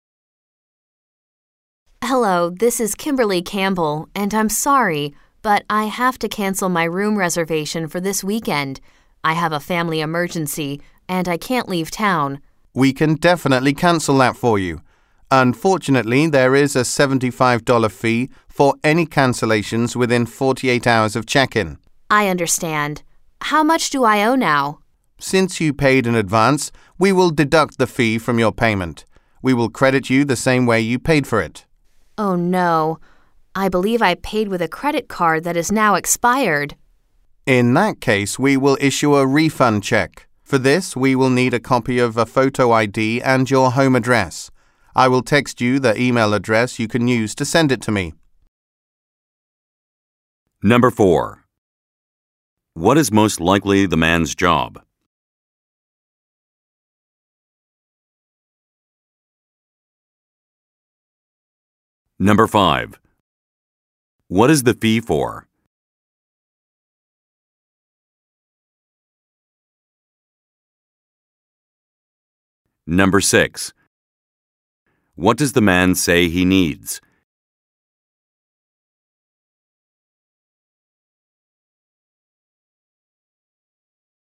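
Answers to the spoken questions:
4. Hotel receptionist
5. Cancelling a reservation within 48 hours of check-in
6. A copy of a photo ID and her home address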